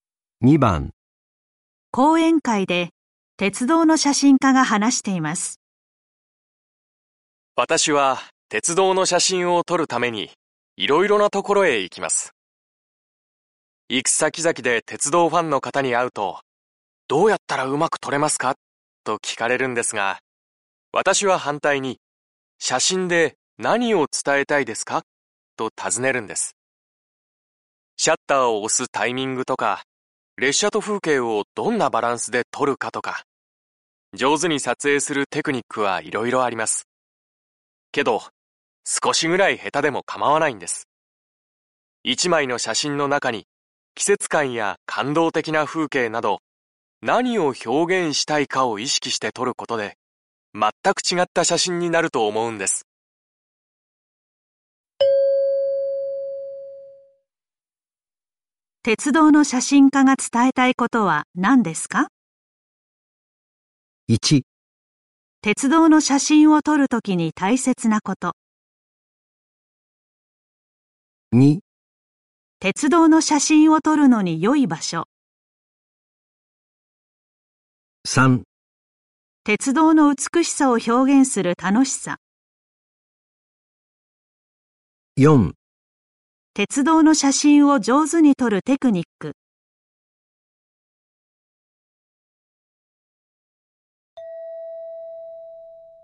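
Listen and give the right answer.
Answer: 1: 鉄道の写真を撮るときに大切なこと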